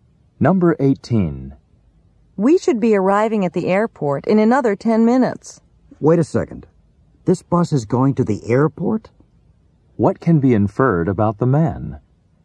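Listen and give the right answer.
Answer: He didn't know the bus was going to the airport.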